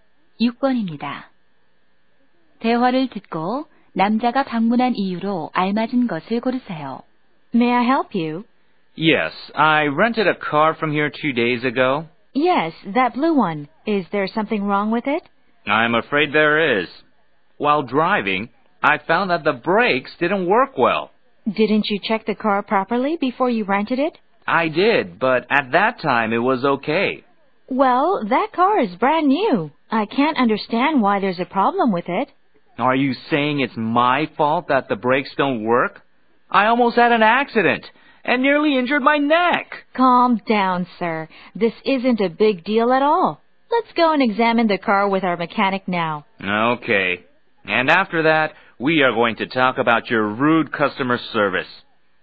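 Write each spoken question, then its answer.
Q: 대화를 듣고 남자가 방문한 이유로 알맞은 것을 고르세요.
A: 빌린 차의 브레이크 고장에 항의하려고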